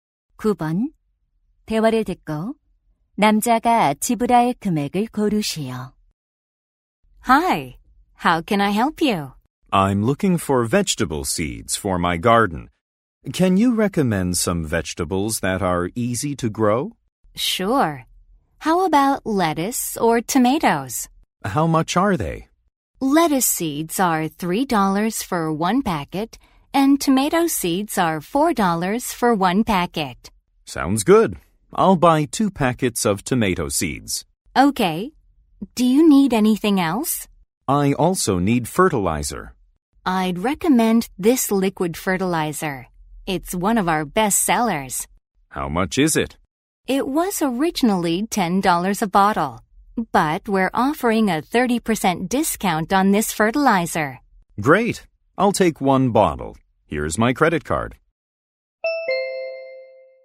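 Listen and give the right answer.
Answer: $15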